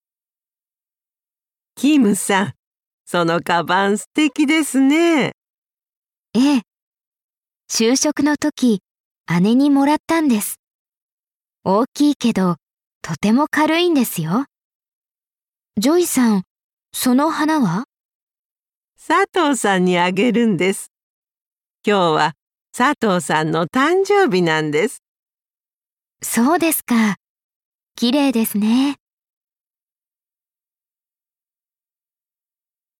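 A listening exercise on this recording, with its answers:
Listen and answer the question.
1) 花はだれにあげますか。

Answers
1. 佐藤さん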